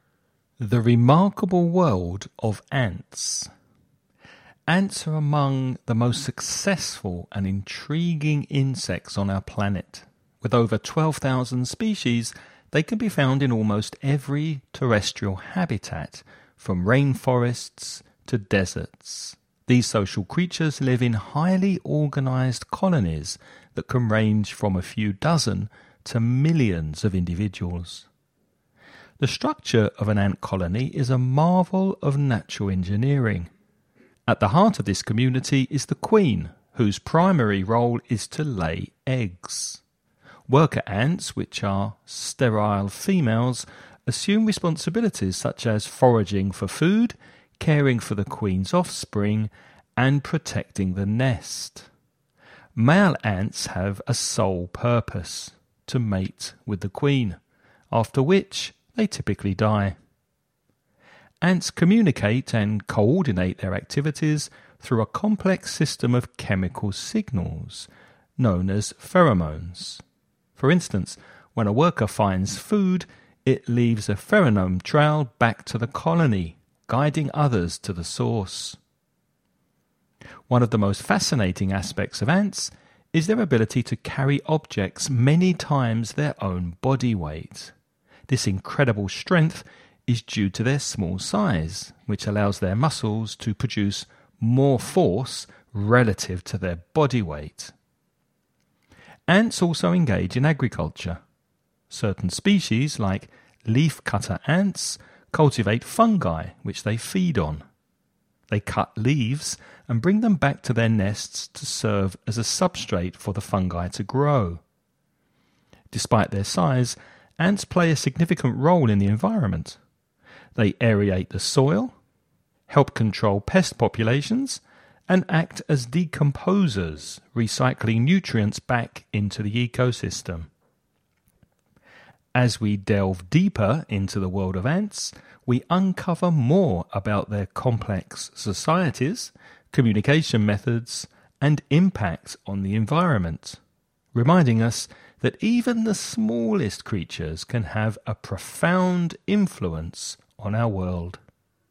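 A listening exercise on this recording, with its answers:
Before you listen to a man talking about ants, read the following questions..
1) How many species of ants are known to exist?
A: Over 12,000

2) What is the role of the queen ant?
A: To lay eggs

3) What do worker ants do?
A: They forage for food, care for the queen's offspring and protect the nest

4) How do ants communicate?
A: Through chemical signals called pheromones

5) Why can ants carry heavy objects?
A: Because their small size lets their muscles produce more force relative to their body weight

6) What is unique about leafcutter ants?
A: They cultivate fungi, which they feed on, using cut leaves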